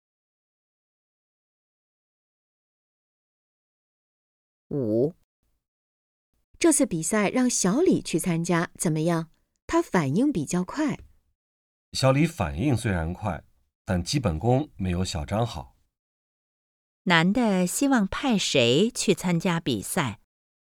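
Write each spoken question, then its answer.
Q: 男的希望派谁去参加比赛?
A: 小张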